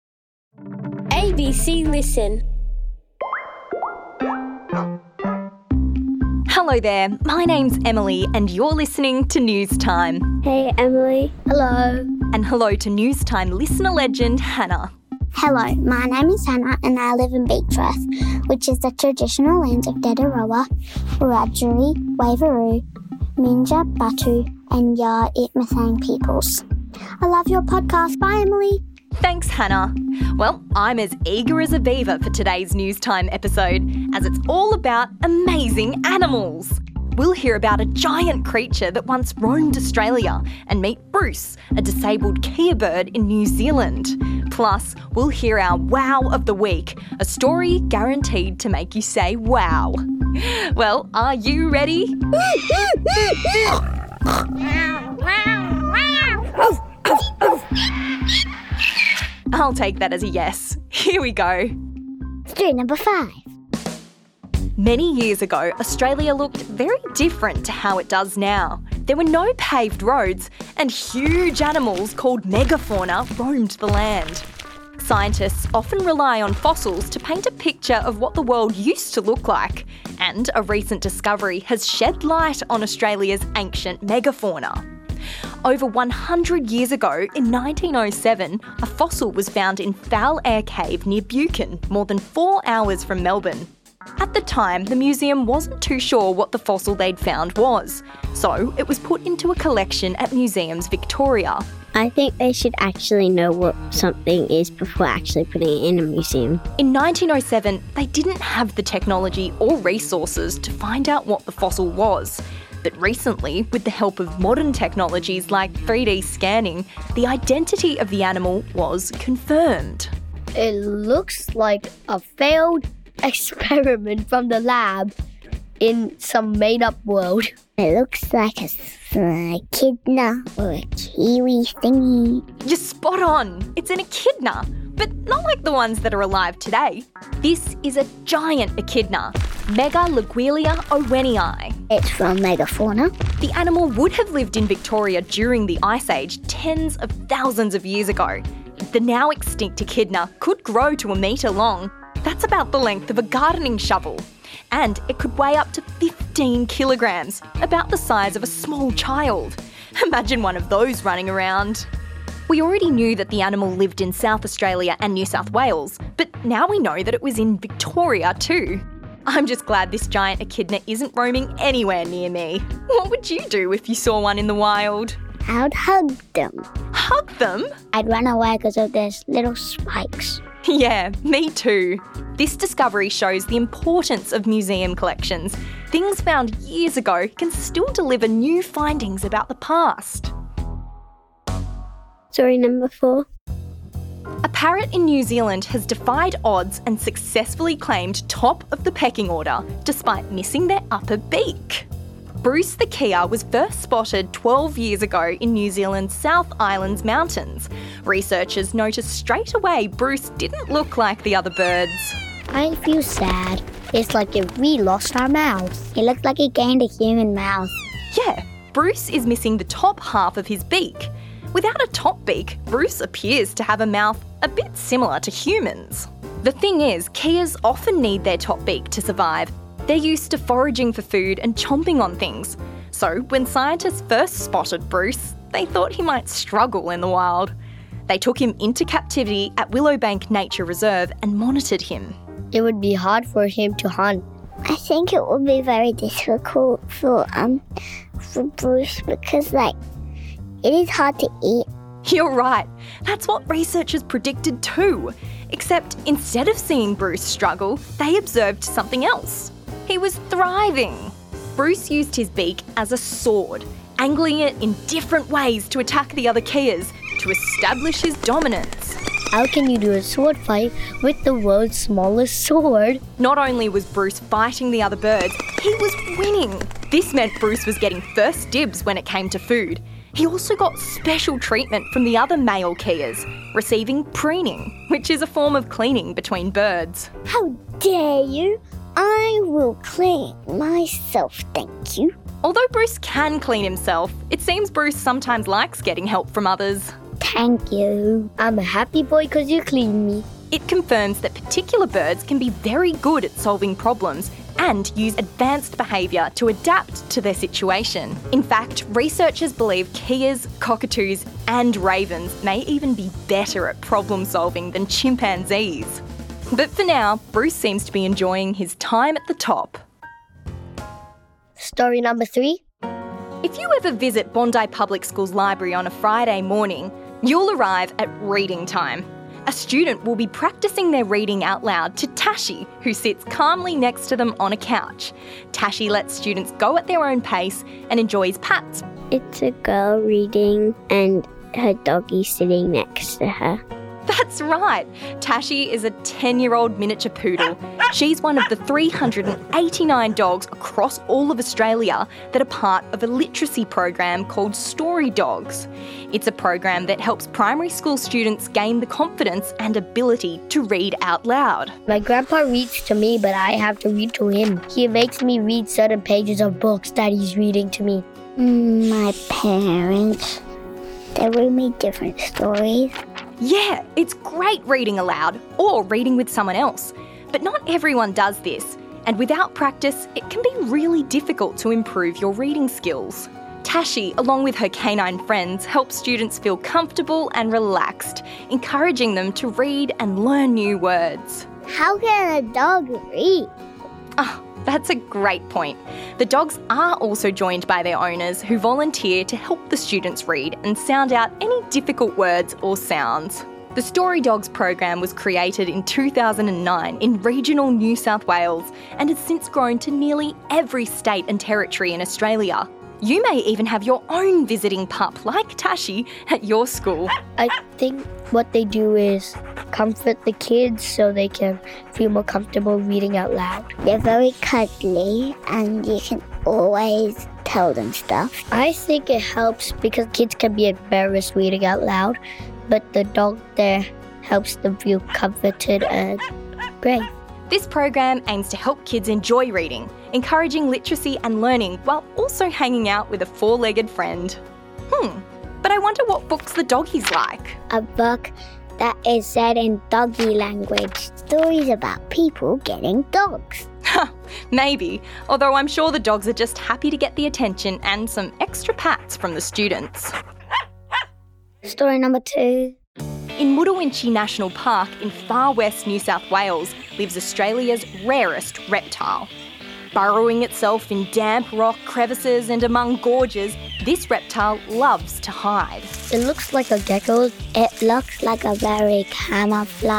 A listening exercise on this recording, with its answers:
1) What animal did the fossil in the museum belong to?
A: A giant echidna